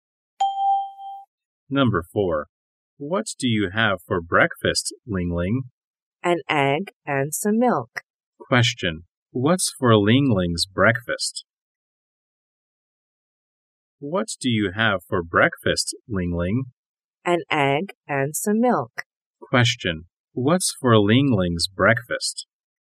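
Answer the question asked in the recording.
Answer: An egg and some milk.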